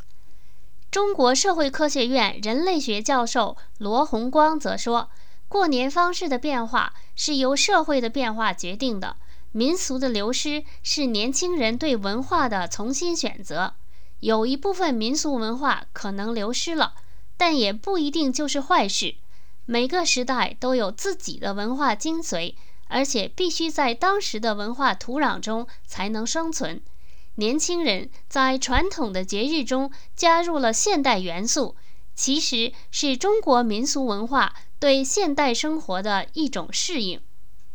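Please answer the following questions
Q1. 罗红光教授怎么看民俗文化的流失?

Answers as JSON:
{"1": "民俗的流失是年轻人对文化的重新选择,不一定是坏事"}

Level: 3rd Year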